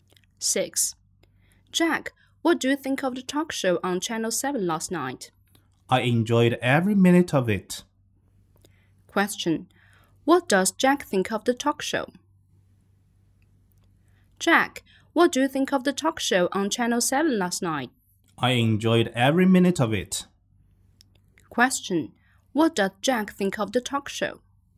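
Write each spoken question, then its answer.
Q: What does Jack think of the talk show?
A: He enjoyed it very much.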